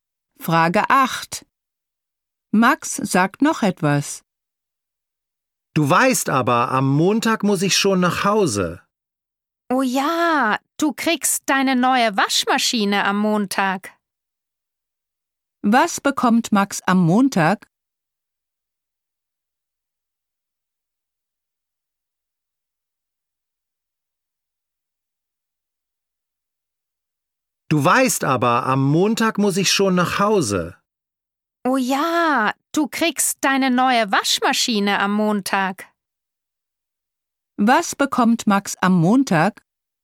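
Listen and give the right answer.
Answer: Eine neue Waschmaschine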